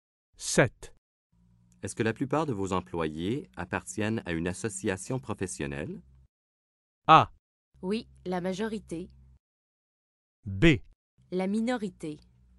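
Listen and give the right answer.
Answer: A: Oui, la majorité.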